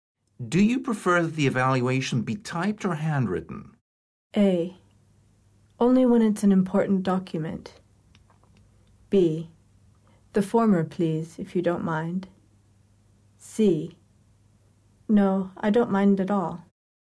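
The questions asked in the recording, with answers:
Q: Do you prefer that the evaluation be typed or handwritten?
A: B: The former, please, if you don't mind.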